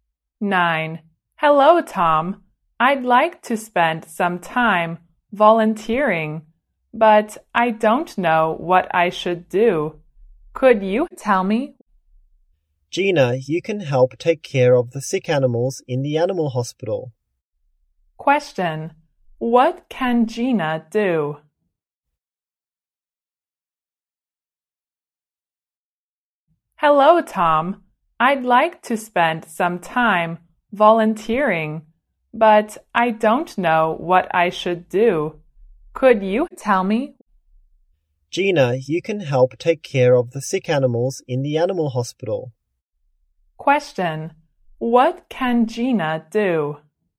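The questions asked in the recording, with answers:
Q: what can Gina do?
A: Help take care of sick animals in the animal hospital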